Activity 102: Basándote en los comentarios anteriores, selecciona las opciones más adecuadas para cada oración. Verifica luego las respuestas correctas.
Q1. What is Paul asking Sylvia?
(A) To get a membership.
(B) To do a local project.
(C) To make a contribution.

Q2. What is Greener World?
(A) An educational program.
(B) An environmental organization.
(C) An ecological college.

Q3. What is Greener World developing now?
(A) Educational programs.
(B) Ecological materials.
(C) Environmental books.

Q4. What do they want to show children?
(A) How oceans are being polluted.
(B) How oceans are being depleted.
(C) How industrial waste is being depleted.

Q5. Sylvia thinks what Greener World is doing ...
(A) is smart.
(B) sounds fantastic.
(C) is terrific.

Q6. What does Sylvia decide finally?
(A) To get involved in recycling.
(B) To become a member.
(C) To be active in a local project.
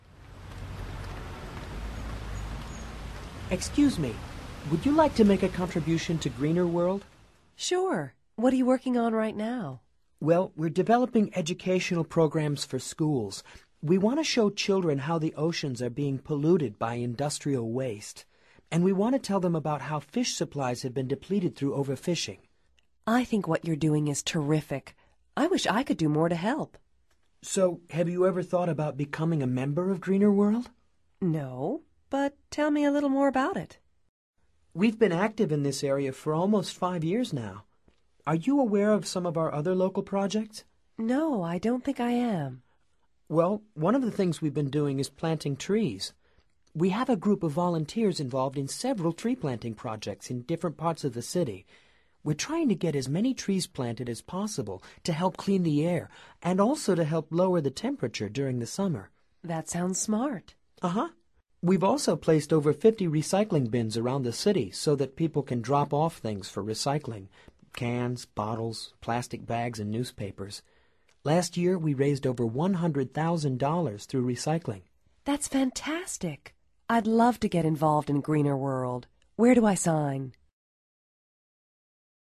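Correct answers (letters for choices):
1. C
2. B
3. A
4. A
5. C
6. B

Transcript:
Excuse me. Would you like to make a contribution to Greener World?
Sure. What are you working on right now?
Well, we're developing educational programs for schools. We want to show children how the oceans are being polluted by industrial waste. And we want to tell them about how fish supplies have been depleted through overfishing.
I think what you're doing is terrific. I wish I could do more to help.
So, have you ever thought about becoming a member of Greener World?
No, but tell me a little more about it.
We've been active in this area for almost five years now. Are you aware of some of our other local projects?
No, I don't think I am.
Well, one of the things we've been doing is planting trees. We have a group of volunteers involved in several tree-planting projects in different parts of the city. We're trying to get as many trees planted as possible to help clean the air and also to help lower the temperature during the summer.
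That sounds smart.
Uh-huh. We've also placed over 50 recycling bins around the city so that people can drop off things for recycling – cans, bottles, plastic bags, and newspapers. Last year we raised over $100,000 through recycling.
That's fantastic. I'd love to get involved in Greener World. Where do I sign?

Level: Nivel Avanzado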